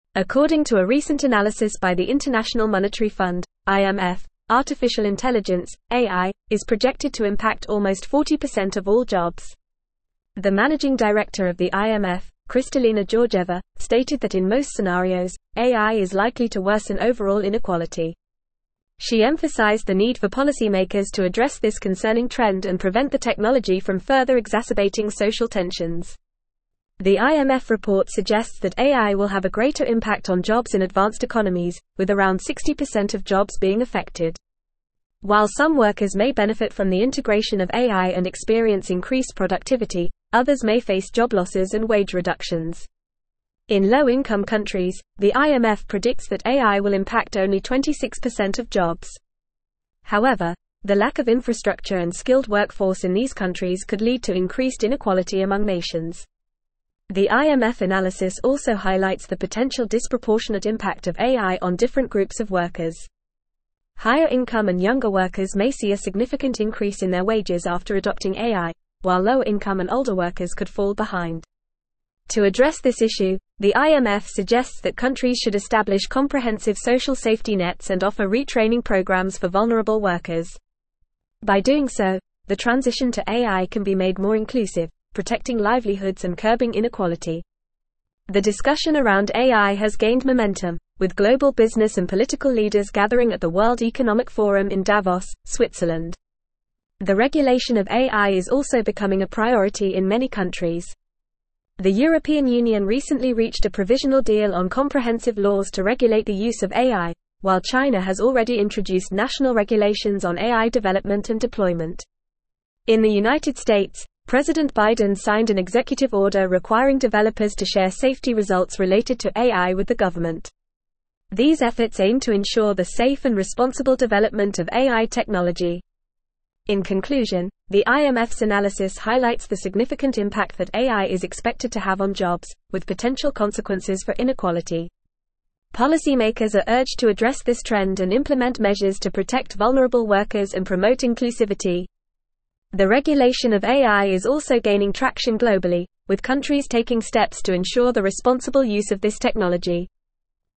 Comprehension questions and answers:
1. According to a recent analysis by the International (1)______ Fund (IMF), artificial intelligence (AI) is projected to impact almost 40% of all jobs.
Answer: Monetary

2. She emphasized the need for policymakers to address this concerning (2)______ and (3)______ the technology from further exacerbating social tensions.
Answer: trend

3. She emphasized the need for policymakers to address this concerning (2)______ and (3)______ the technology from further exacerbating social tensions.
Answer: prevent

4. While some workers may benefit from the (4)______ of AI and experience increased productivity, others may face job losses and wage reductions.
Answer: integration

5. However, the lack of infrastructure and skilled workforce in these countries could lead to increased inequality among (5)______.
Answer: nations

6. To (6)______ this (7)______, the IMF suggests that countries should (8)______ (9)______ social safety nets and offer (10)______ programs for vulnerable workers.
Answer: address

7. To (6)______ this (7)______, the IMF suggests that countries should (8)______ (9)______ social safety nets and offer (10)______ programs for vulnerable workers.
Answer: issue

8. To (6)______ this (7)______, the IMF suggests that countries should (8)______ (9)______ social safety nets and offer (10)______ programs for vulnerable workers.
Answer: establish

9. To (6)______ this (7)______, the IMF suggests that countries should (8)______ (9)______ social safety nets and offer (10)______ programs for vulnerable workers.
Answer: comprehensive

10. To (6)______ this (7)______, the IMF suggests that countries should (8)______ (9)______ social safety nets and offer (10)______ programs for vulnerable workers.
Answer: retraining

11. The discussion around AI has gained momentum, with global business and political leaders gathering at the (11)______ Economic Forum in Davos, Switzerland.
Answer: World

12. The European Union recently reached a provisional deal on comprehensive laws to regulate the use of AI, while China has already introduced (12)______ regulations on AI development and deployment.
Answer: national

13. These efforts aim to ensure the safe and responsible development of AI (13)______.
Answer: technology

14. Policymakers are urged to address this trend and implement (14)______ to protect vulnerable workers and (15)______ inclusivity.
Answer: measures

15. Policymakers are urged to address this trend and implement (14)______ to protect vulnerable workers and (15)______ inclusivity.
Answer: promote

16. The regulation of AI is also gaining (16)______ globally, with countries taking steps to ensure the responsible use of this technology.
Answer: traction

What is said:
According to a recent analysis by the International Monetary Fund (IMF), artificial intelligence (AI) is projected to impact almost 40% of all jobs. The managing director of the IMF, Kristalina Georgieva, stated that in most scenarios, AI is likely to worsen overall inequality. She emphasized the need for policymakers to address this concerning trend and prevent the technology from further exacerbating social tensions. The IMF report suggests that AI will have a greater impact on jobs in advanced economies, with around 60% of jobs being affected. While some workers may benefit from the integration of AI and experience increased productivity, others may face job losses and wage reductions. In low-income countries, the IMF predicts that AI will impact only 26% of jobs. However, the lack of infrastructure and skilled workforce in these countries could lead to increased inequality among nations.
The IMF analysis also highlights the potential disproportionate impact of AI on different groups of workers. Higher-income and younger workers may see a significant increase in their wages after adopting AI, while lower-income and older workers could fall behind. To address this issue, the IMF suggests that countries should establish comprehensive social safety nets and offer retraining programs for vulnerable workers. By doing so, the transition to AI can be made more inclusive, protecting livelihoods and curbing inequality.
The discussion around AI has gained momentum, with global business and political leaders gathering at the World Economic Forum in Davos, Switzerland. The regulation of AI is also becoming a priority in many countries. The European Union recently reached a provisional deal on comprehensive laws to regulate the use of AI, while China has already introduced national regulations on AI development and deployment. In the United States, President Biden signed an executive order requiring developers to share safety results related to AI with the government. These efforts aim to ensure the safe and responsible development of AI technology.
In conclusion, the IMF's analysis highlights the significant impact that AI is expected to have on jobs, with potential consequences for inequality. Policymakers are urged to address this trend and implement measures to protect vulnerable workers and promote inclusivity. The regulation of AI is also gaining traction globally, with countries taking steps to ensure the responsible use of this technology.

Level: Level 4